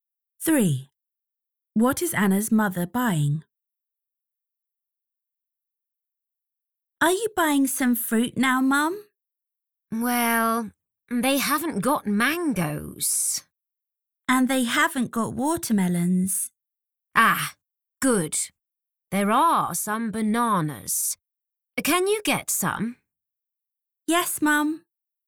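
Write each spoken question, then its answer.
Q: What is Anna's mother buying?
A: bananas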